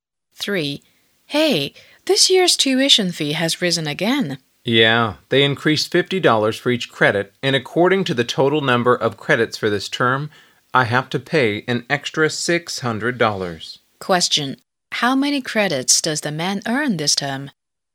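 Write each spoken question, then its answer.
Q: How many credits does the man earn this term?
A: 12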